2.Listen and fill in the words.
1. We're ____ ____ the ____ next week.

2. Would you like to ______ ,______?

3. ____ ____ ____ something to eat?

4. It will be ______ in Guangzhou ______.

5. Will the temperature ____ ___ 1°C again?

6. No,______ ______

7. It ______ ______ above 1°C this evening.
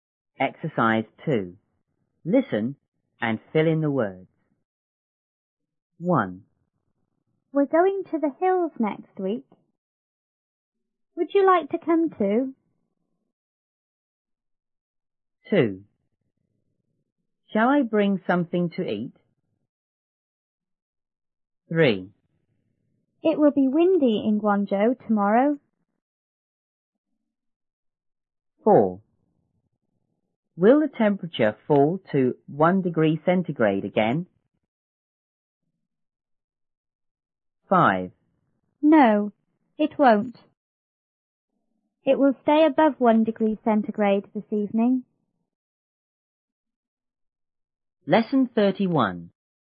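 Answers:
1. going to; hills
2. come; too
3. Shall I bring
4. windy; tomorrow
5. fall to
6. it won't
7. will stay

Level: 六年级下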